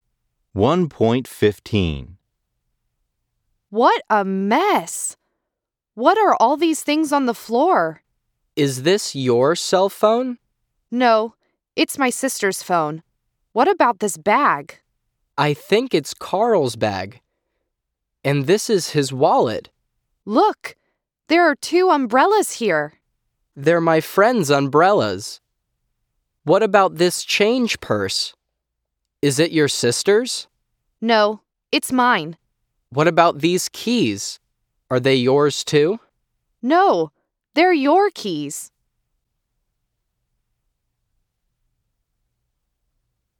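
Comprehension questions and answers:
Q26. The girl said, "What a mess!"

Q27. She said, "What are all of these things on the bed?"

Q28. She said it's her brother's phone.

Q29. He said that it's Carl's bag.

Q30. She said that there are four umbrellas.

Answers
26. True
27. False
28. False
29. True
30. False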